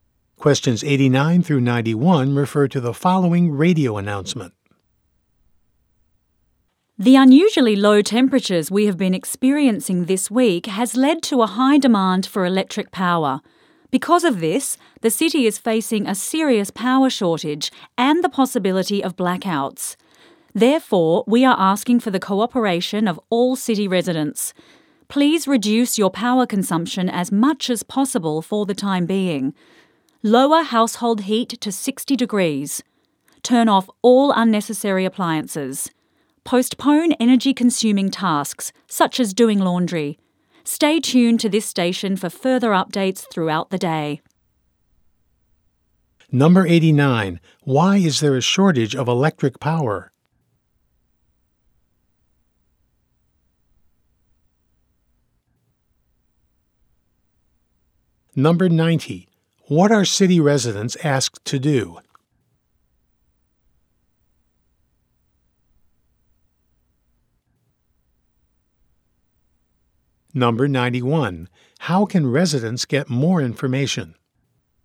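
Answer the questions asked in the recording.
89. Unusually low temperatures caused high demand
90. Reduce their power use
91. By staying tuned to the radio station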